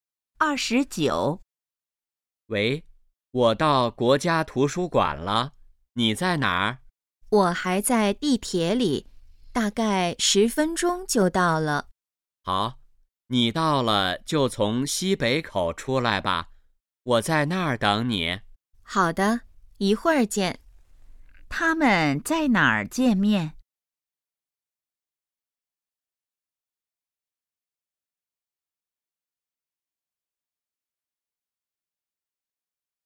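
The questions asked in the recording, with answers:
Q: 他们在哪儿见面?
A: 国家图书馆西北口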